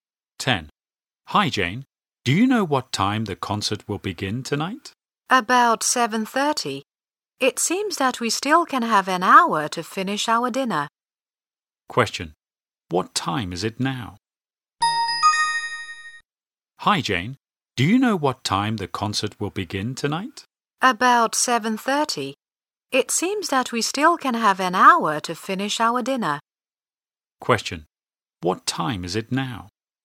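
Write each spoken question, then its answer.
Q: What time is it now?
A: About 6:30.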